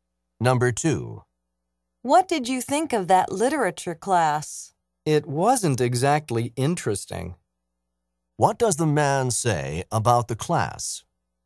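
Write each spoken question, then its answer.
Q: What does the man say about the class?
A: It wasn't very interesting.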